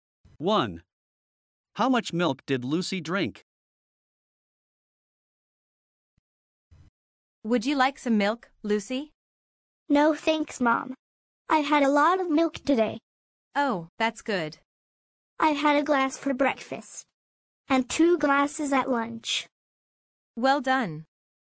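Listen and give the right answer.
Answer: Three glasses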